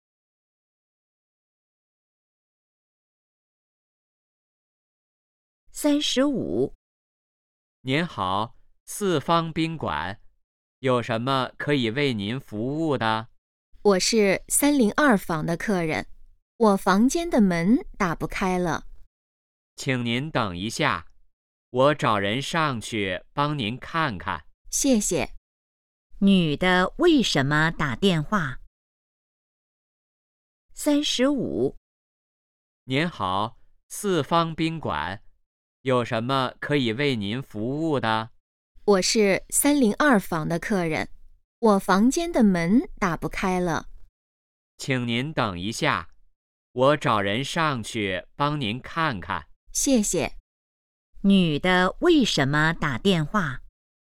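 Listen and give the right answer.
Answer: 房间的门打不开了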